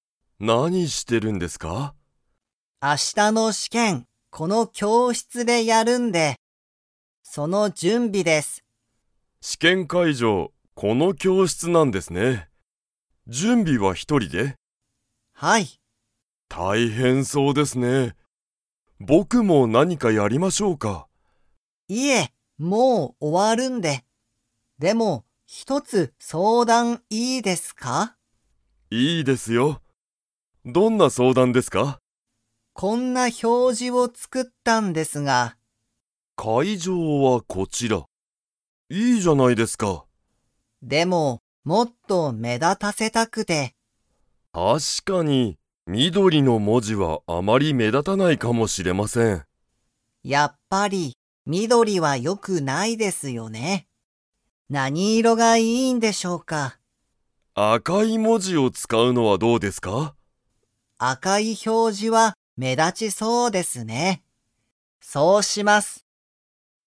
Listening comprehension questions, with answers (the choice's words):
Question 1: 明日あした、この教室きょうしつで何なにをやりますか?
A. 試験しけん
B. 仕事しごと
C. 勉強べんきょう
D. 相談そうだん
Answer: 試験しけん

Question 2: 緑みどりの文字もじは かもしれない。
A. よく目立めだつ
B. あまり目立めだたない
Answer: あまり目立めだたない

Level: Level 4